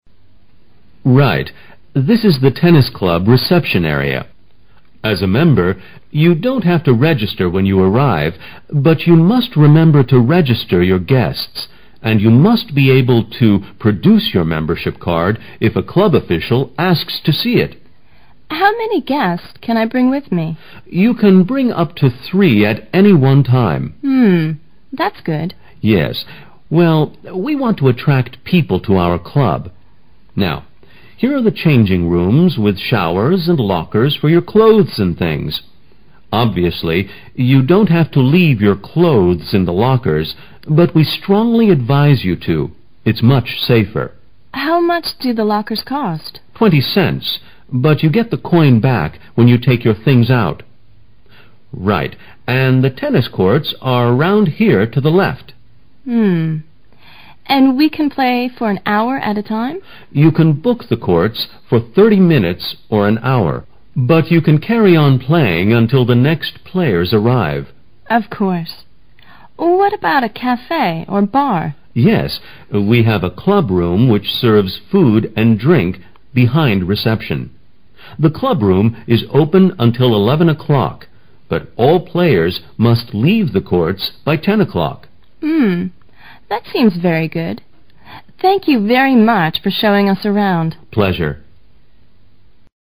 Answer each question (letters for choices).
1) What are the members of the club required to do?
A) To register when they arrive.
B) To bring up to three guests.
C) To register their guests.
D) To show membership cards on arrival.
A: C

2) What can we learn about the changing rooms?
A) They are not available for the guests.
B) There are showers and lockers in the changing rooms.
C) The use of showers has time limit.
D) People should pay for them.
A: B

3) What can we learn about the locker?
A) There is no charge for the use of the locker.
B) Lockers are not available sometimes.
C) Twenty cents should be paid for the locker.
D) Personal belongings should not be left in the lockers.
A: A

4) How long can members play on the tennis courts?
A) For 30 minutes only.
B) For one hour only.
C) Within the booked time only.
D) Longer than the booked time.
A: D

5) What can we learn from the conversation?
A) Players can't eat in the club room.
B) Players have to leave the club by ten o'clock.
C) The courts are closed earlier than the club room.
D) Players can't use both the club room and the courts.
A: C

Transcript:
M: Right, this is the tennis club reception area. As a member, you don't have to register when you arrive. But you must remember to register your guests. And you must be able to produce your membership card if a club official asks to see it.
W: How many guests can I bring with me?
M: You can bring up to 3 at any one time.
W: Hum, that's good.
M: Yes. Well, we want to attract people to our club. Now, here are the changing rooms with showers and lockers for your clothes and things. Obviously, you don't have to leave your clothes in the lockers. But we strongly advise you to. It's much safer.
W: How much do the lockers cost?
M: Twenty cents. But you get the coin back when you take your things out. Right, and the tennis courts are round here to the left.
W: Hum. And we can play for an hour at a time?
M: You can book the courts for thirty minutes or an hour. But you can carry on playing until the next players arrive.
W: Of course. What about cafe or bar?
M: Yes, we have a club room which serves food and drink behind the reception. The club room is open until 11 o'clock. But all players must leave the courts by 10 o'clock.
W: Hum. That seems very good. Thank you very much for showing us around.
M: Pleasure.